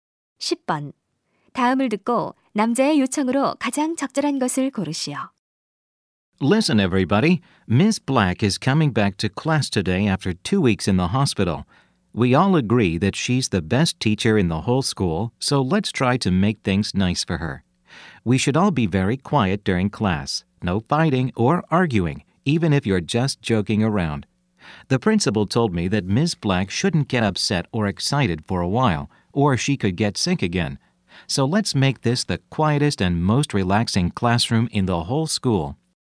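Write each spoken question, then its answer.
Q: 다음을 듣고 남자의 요청으로 가장 적절한 것을 고르시오.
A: 수업 중 조용히 하기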